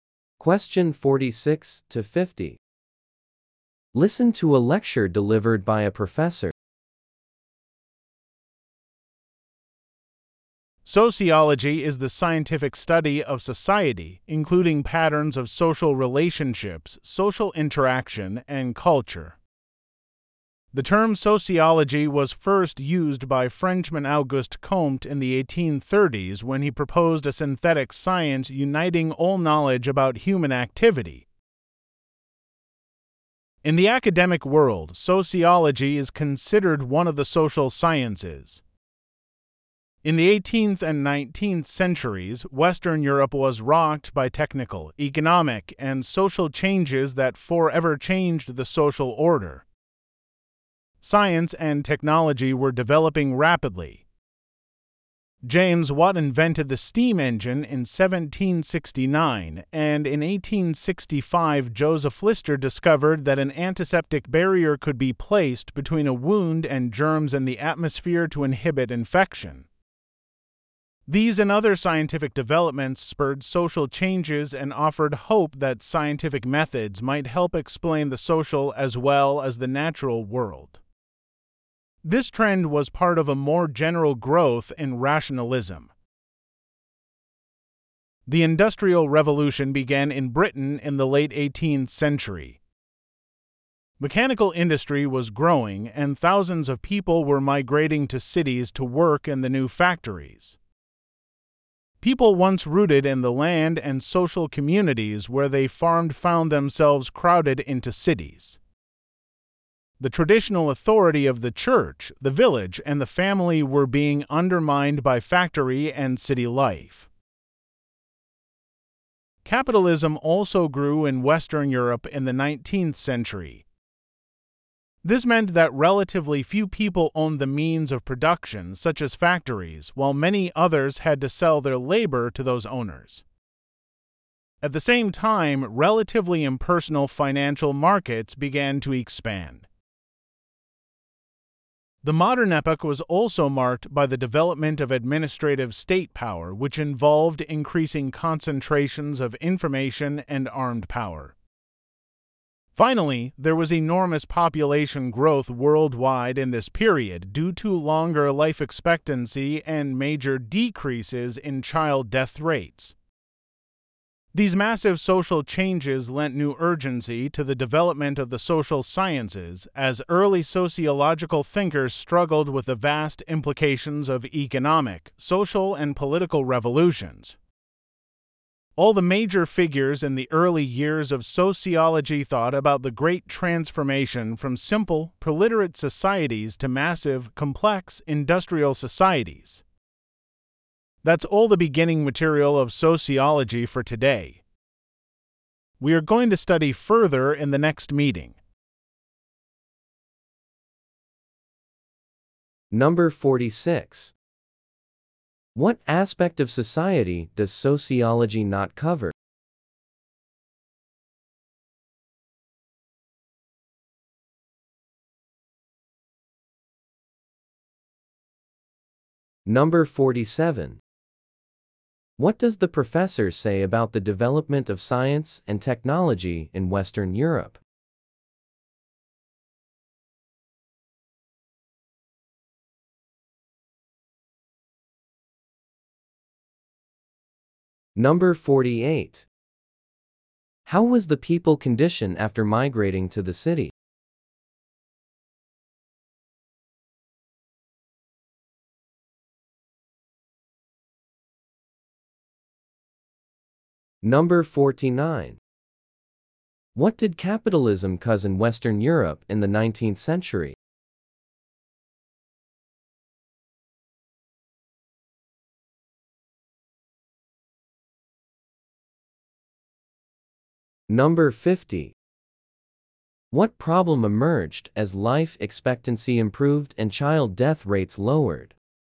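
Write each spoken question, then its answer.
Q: What does the professor say about the development of science and technology in Western Europe?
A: It developed rapidly and caused social changes.

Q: How was the people conditioned after migrating to the city?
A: They were crowded into cities.

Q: What did capitalism cause in Western Europe in the 19th century?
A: A few people owned the means of production while many sold their labor.

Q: What problem emerged as life expectancy improved and child death rates lowered?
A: Huge population growth.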